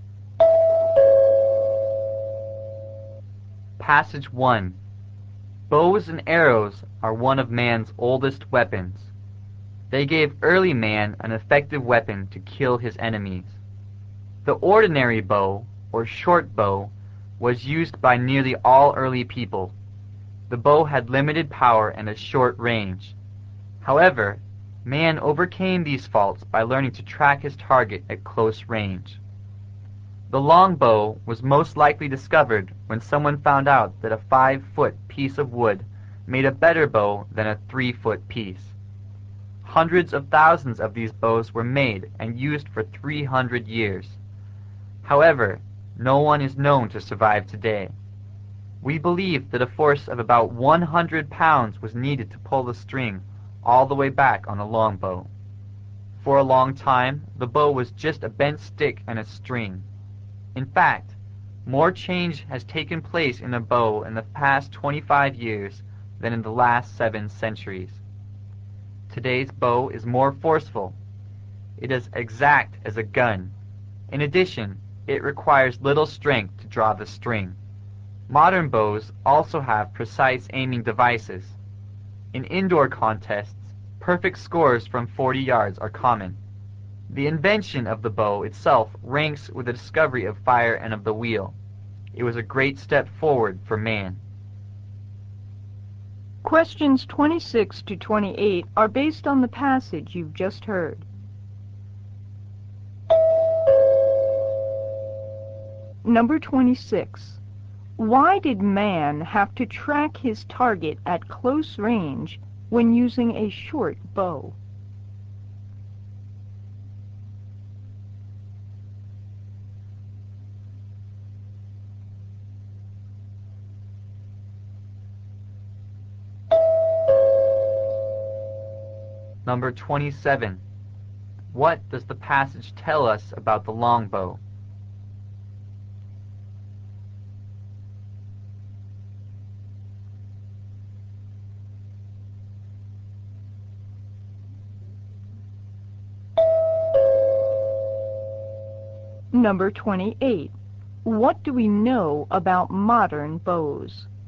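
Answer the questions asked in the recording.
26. The bow had limited power and a short range
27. It was used for 300 years but none survives today
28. They are more forceful, as exact as a gun, and need little strength to draw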